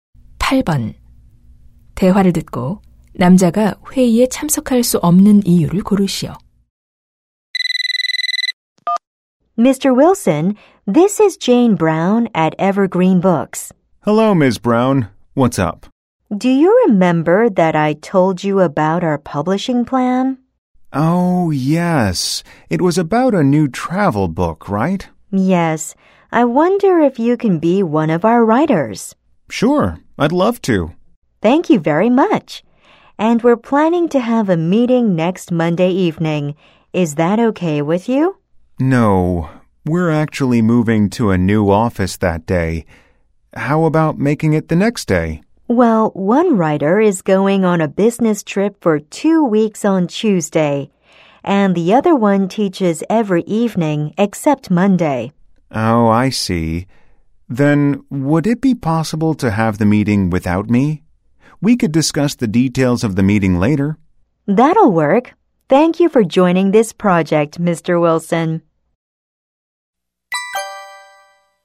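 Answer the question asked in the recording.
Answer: 그날 새 사무실로 이사하기 때문에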